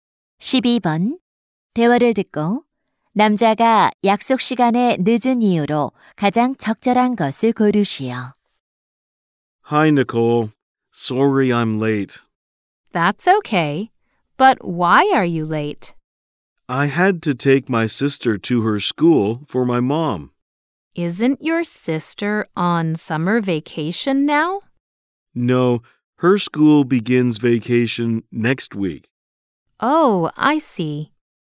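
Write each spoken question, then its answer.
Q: 대화를 듣고 남자가 약속 시간에 늦은 이유로 가장 적절한 것을 고르시오.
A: 엄마 대신 여동생을 학교에 데려다줘야 해서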